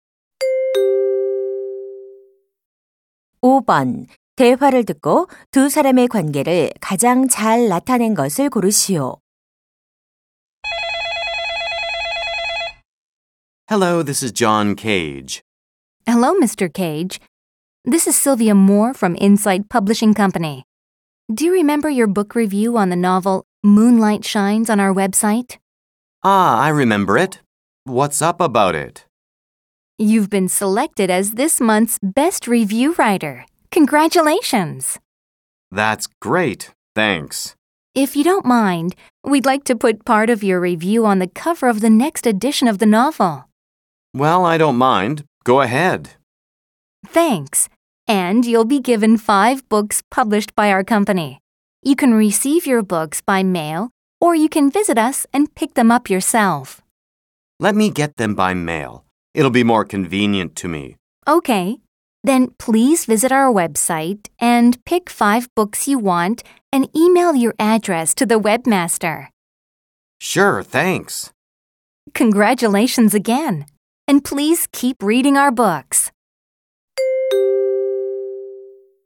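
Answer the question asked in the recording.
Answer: 출판사 직원 - 서평 작성자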